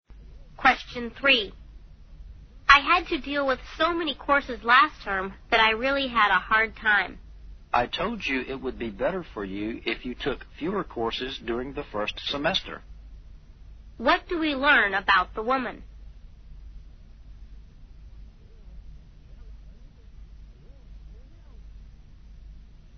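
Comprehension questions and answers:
What do we learn about the woman?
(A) She made a mistake by taking too few courses in the first term.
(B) The courses she took were too difficult for her.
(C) She took too many courses during her first term.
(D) She found it difficult to deal with college courses.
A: (C) She took too many courses during her first term.

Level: 大学英语四级

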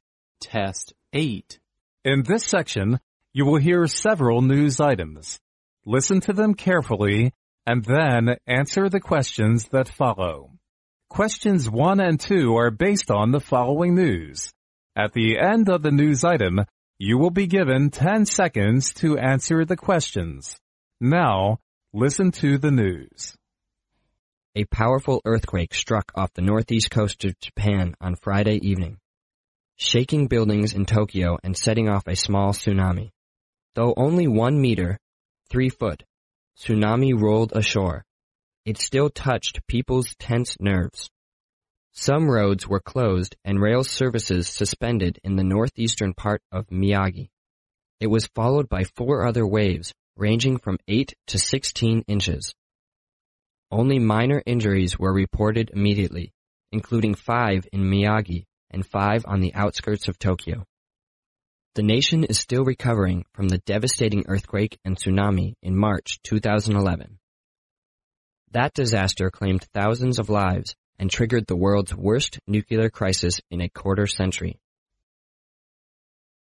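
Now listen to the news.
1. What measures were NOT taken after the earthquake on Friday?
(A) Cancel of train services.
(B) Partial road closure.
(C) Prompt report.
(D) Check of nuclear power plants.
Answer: (D) Check of nuclear power plants.

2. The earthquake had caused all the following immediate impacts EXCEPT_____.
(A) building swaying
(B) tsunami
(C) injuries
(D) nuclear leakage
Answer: (D) nuclear leakage

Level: 专业四级

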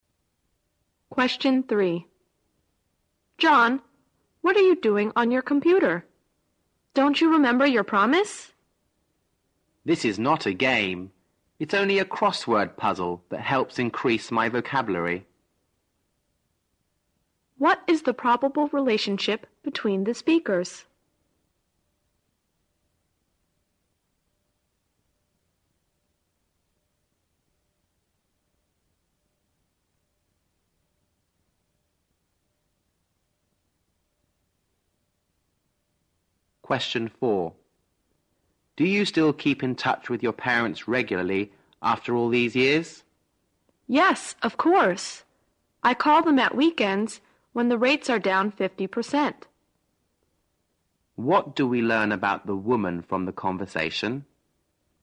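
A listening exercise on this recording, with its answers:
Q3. What is the probable relationship between the speakers?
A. Colleagues.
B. Husband and wife.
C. Employer and employee.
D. Mother and son.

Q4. What do we learn about the woman from the conversation?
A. She contacts her parents occasionally.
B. She phones her parents regularly at weekends.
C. She visits her parents at weekends when the fares are down.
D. She often call her parents regardless of the rates.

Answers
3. D. Mother and son.
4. B. She phones her parents regularly at weekends.

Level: 四级

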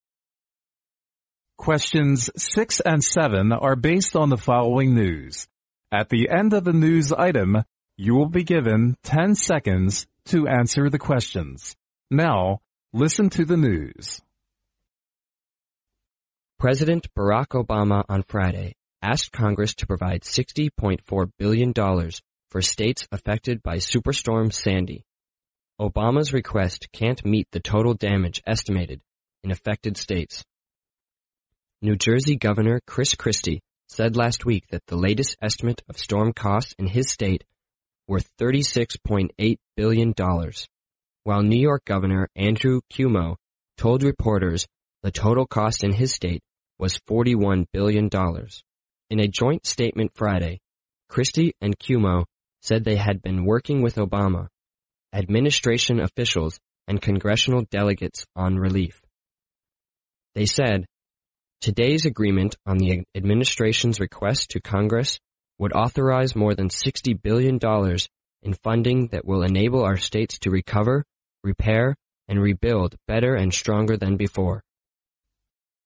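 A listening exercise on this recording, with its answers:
Now listen to the news.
The total damage cost in both New Jersey and New York amounts to_____.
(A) $60.4 billion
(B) $60 billion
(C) $41 billion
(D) $77.8 billion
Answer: (D) $77.8 billion

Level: 专业四级

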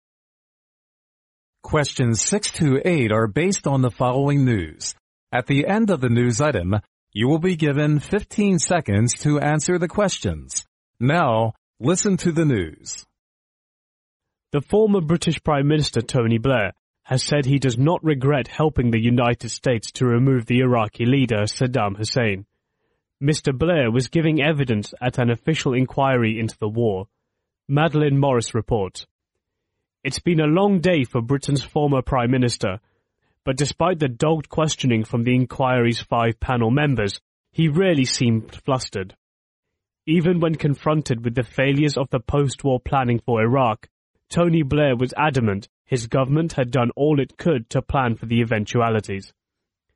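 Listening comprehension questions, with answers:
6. What does the news item mainly talk about?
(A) Tony Blair doesn't regret helping the US to remove the Iraqi leader Saddam Hussein.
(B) Tony Blair does regret helping the US to remove the Iraqi leader Saddam Hussein.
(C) Tony Blair hadn't planned to help the US to remove the Iraqi leader Saddam Hussein.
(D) Tony Blair didn't help the US to remove the Iraqi leader Saddam Hussein.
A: (A) Tony Blair doesn't regret helping the US to remove the Iraqi leader Saddam Hussein.

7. There were _____ panel members questioning Tony Blair.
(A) 2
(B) 3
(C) 4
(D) 5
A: (D) 5

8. Blair seemed _____ facing the inquiry members.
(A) adamant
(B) yielding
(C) calm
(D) flustered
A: (A) adamant

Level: 专业四级

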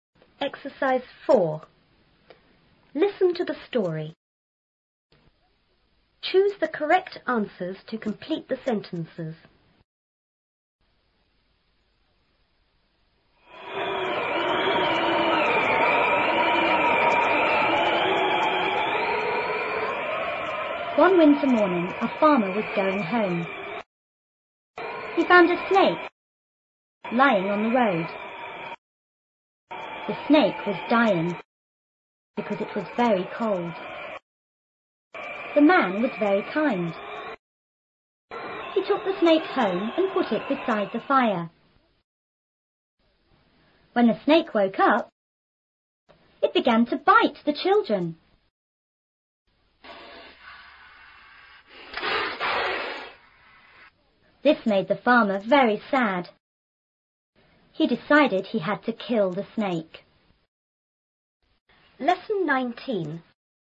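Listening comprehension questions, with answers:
Choose the correct answers to complete the sentences.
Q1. The farmer found the snake___.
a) at home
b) on the farm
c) on the road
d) in the cold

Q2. "The snake was dying" means___.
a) the snake was dead.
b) the snake was going to die.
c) the snake had to die.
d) the snake must die.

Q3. The man___.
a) killed the snake.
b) talked kindly to the snake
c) put the snake into the fire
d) took the snake home.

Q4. The snake___.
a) killed the children.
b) played with the children.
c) bit the children.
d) went home.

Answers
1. c) on the road
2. b) the snake was going to die.
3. d) took the snake home.
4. c) bit the children.

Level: 初中英语广州版4B

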